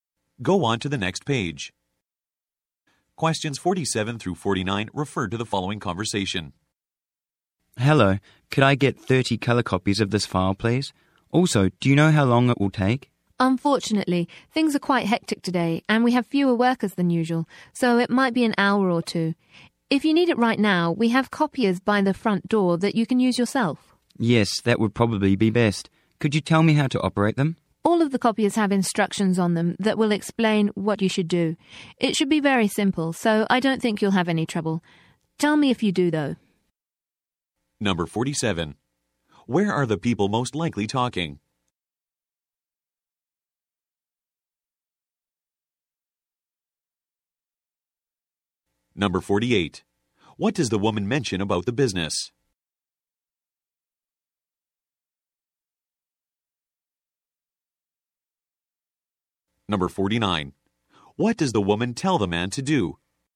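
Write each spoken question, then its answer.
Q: Where are the people most likely talking?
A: At a copy shop

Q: What does the woman mention about the business?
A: It is very busy and has fewer workers than usual

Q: What does the woman tell the man to do?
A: Use the self-service copiers by the front door, following the instructions on them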